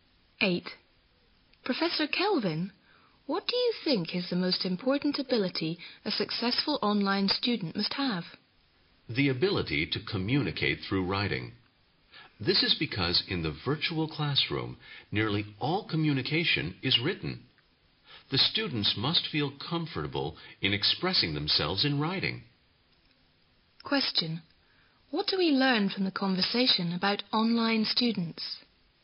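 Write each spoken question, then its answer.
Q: What do we learn from the conversation about online students?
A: They must be able to communicate well in writing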